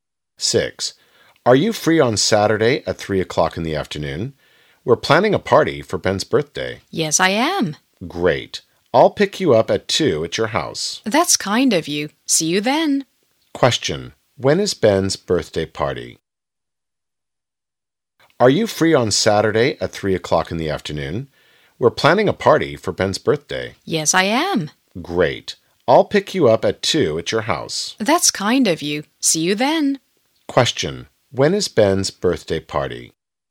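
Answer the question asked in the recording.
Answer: Saturday at 3 o'clock in the afternoon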